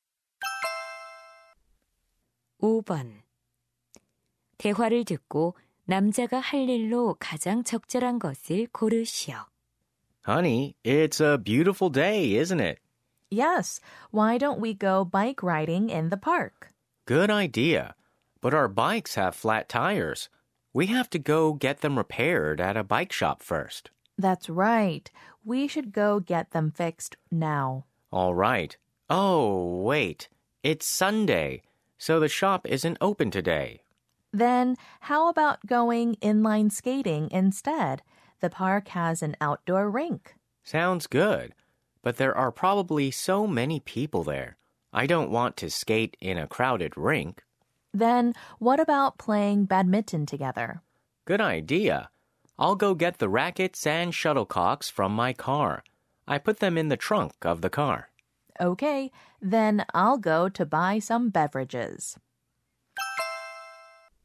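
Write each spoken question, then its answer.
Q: 대화를 듣고 남자가 할 일로 가장 적절한 것을 고르시오.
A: 차에서 배드민턴 라켓과 셔틀콕 가져오기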